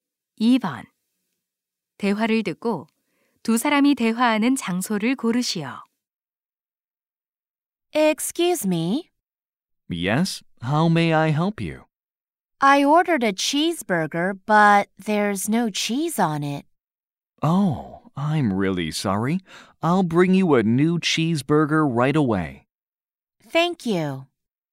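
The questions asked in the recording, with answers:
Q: 대화를 듣고 두 사람이 대화하는 장소를 고르시오.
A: 음식점(햄버거 가게)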